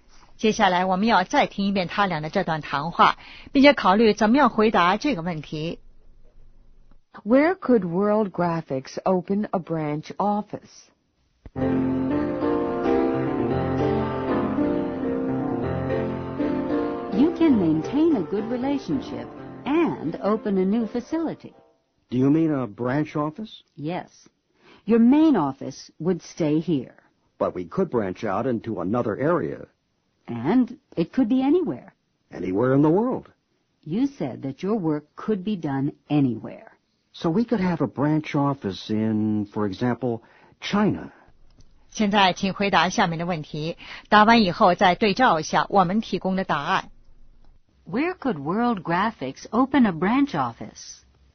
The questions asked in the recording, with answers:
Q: Where could World Graphics open a branch office?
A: Anywhere in the world.